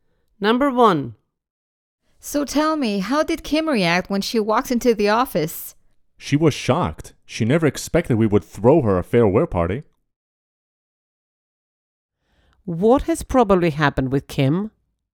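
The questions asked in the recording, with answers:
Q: What has probably happened with Kim?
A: She is leaving and was given a surprise farewell party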